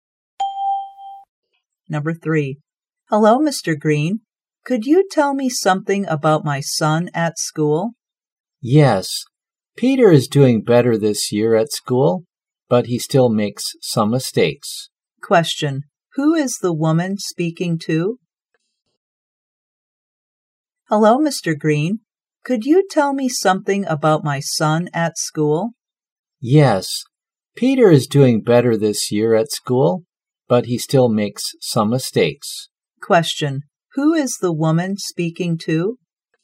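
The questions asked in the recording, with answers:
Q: Who is the woman speaking to?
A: Her son's teacher, Mr. Green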